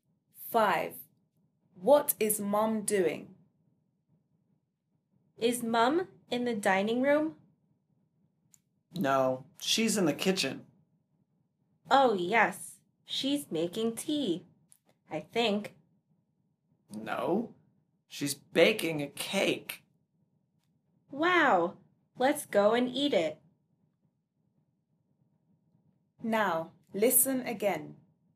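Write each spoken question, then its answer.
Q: What is Mum doing?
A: Baking a cake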